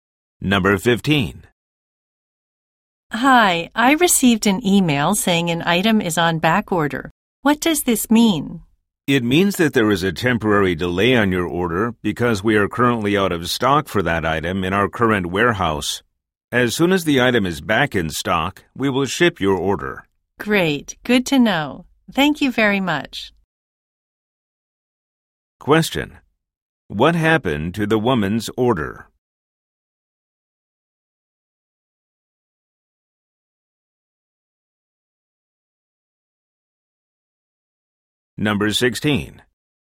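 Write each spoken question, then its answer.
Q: What happened to the woman's order?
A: It is delayed because the item is out of stock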